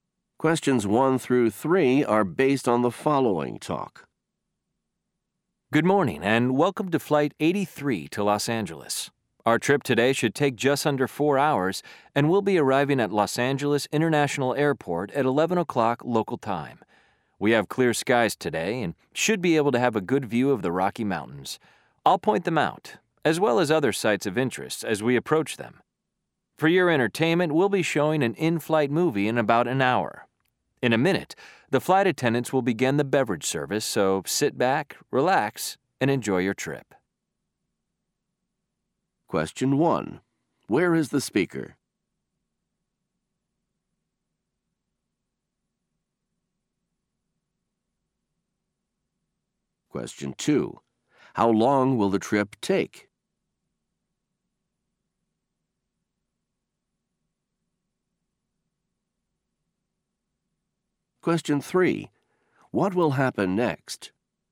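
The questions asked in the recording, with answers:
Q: Where is the speaker?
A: On an airplane (Flight 83 to Los Angeles)

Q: How long will the trip take?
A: Just under 4 hours

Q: What will happen next?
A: The flight attendants will begin the beverage service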